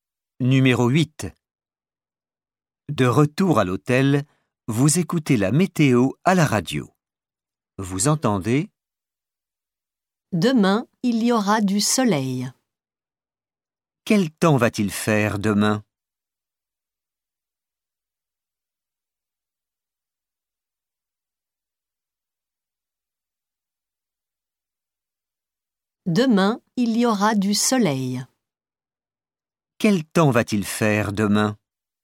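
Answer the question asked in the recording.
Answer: du soleil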